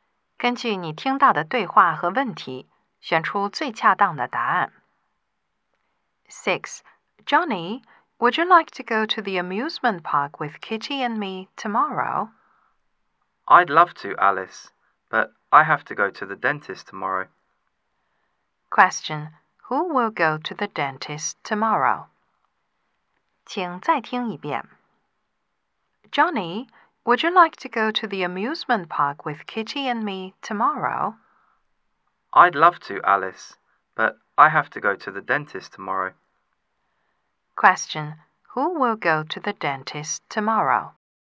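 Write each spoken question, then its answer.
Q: Question, who will go to the dentist tomorrow?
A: Johnny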